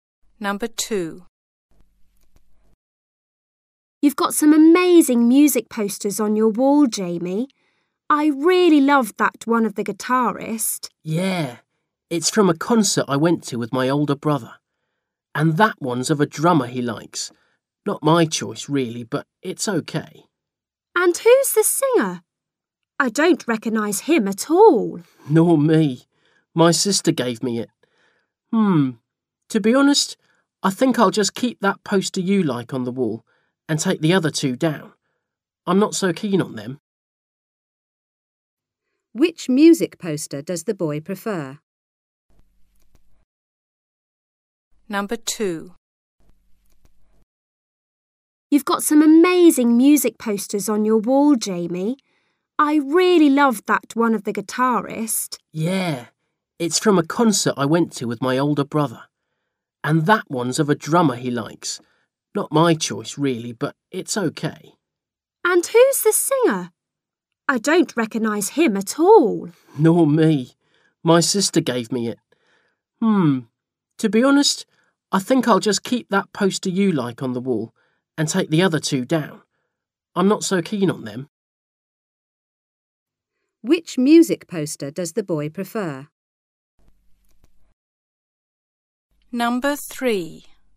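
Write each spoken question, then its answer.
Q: Which music poster does the boy prefer?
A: The one of the guitarist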